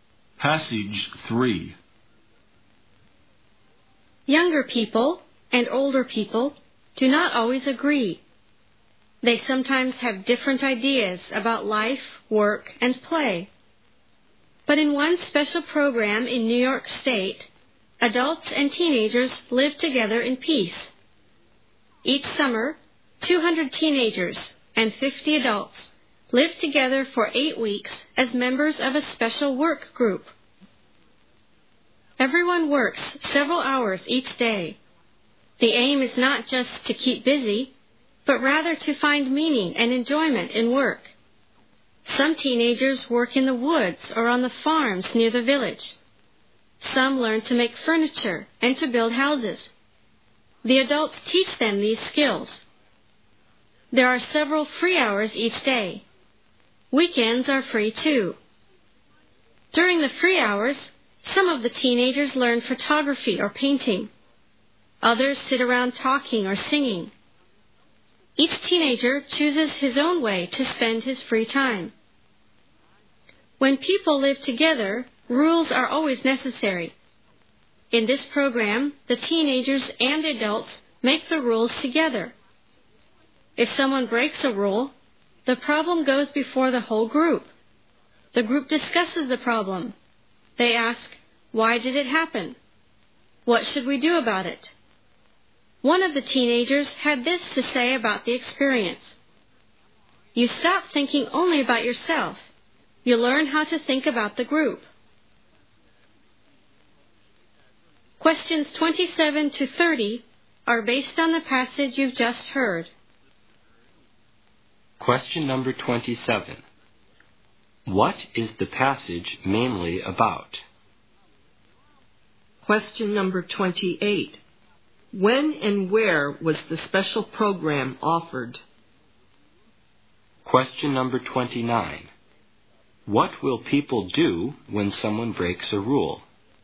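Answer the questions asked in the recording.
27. A summer program where teenagers and adults live and work together
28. Each summer in New York State
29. The whole group discusses the problem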